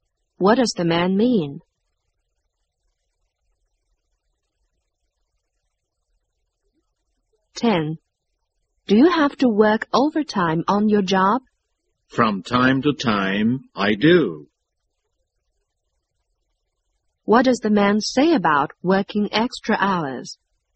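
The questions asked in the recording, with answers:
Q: What does the man say about working extra hours?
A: He works overtime sometimes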